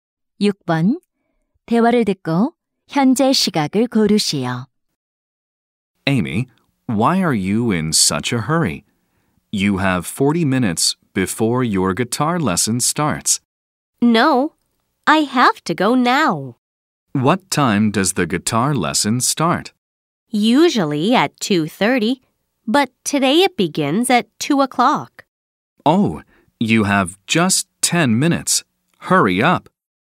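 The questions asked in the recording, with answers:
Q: 대화를 듣고 현재 시각을 고르시오.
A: 1시 50분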